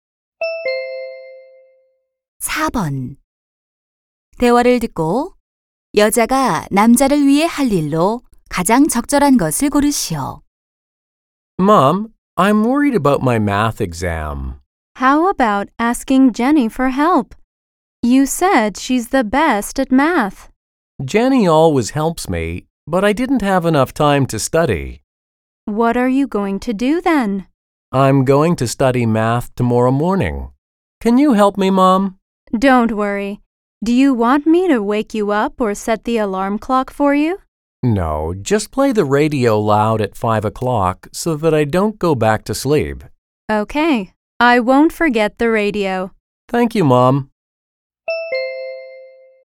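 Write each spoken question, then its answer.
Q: 여자가 남자를 위해 할 일로 가장 적절한 것을 고르시오.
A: 5시에 라디오를 크게 틀어 주기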